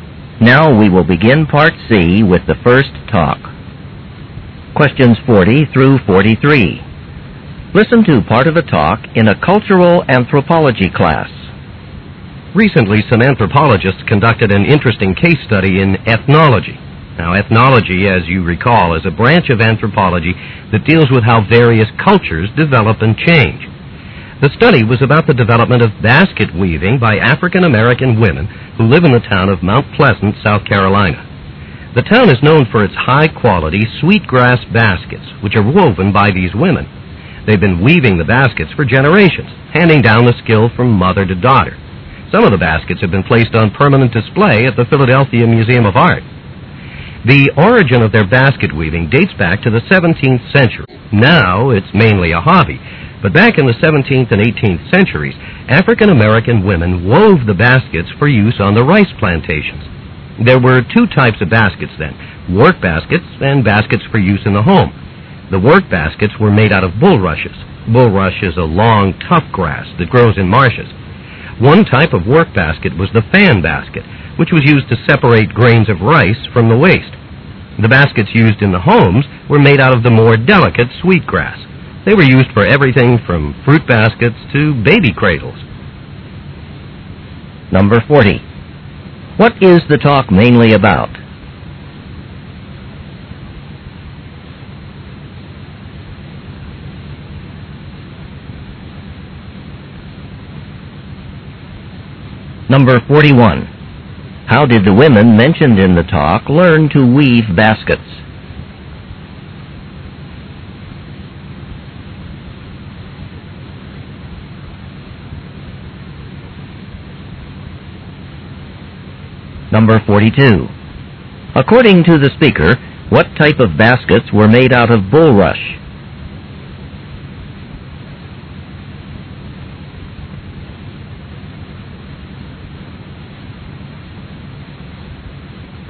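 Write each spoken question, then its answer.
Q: What is the talk mainly about?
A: Sweetgrass basket weaving by African-American women in Mount Pleasant, South Carolina

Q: How did the women mentioned in the talk learn to weave baskets?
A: From their mothers

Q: According to the speaker, what type of baskets were made out of bulrush?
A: Work baskets

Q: What is the main reason that the women in South Carolina now weave baskets?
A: As a hobby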